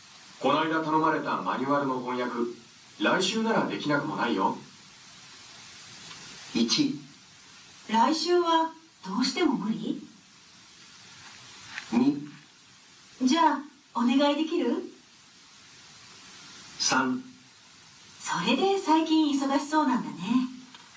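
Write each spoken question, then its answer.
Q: こないだ頼まれたマニュアルの翻訳、来週ならできなくもないよ。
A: 2: じゃあお願いできる?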